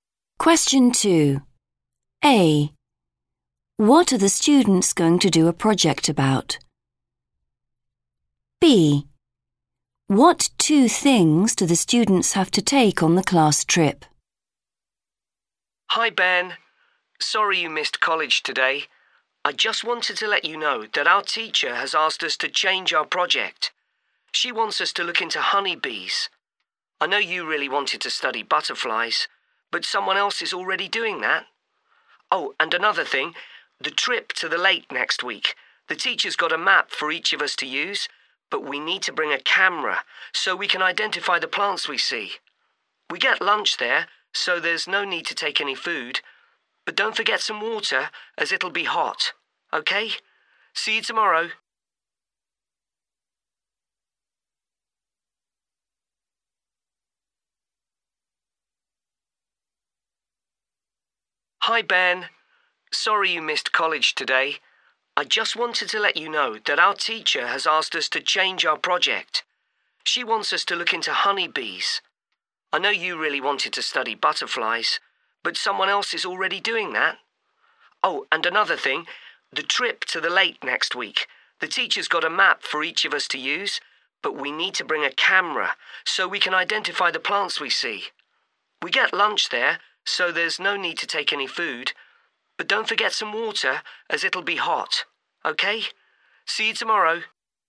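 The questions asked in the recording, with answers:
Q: What are the students going to do a project about?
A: honeybees

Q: What two things do the students have to take on the class trip?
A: a camera and water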